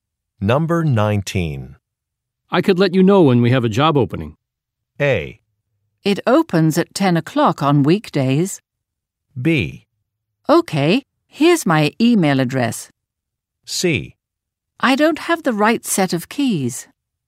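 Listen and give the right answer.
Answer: B: Okay, here's my email address.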